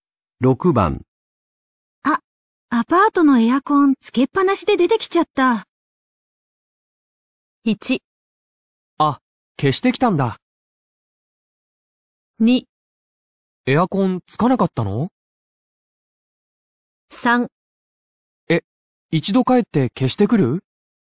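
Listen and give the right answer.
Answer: 3: え、一度帰って消してくる?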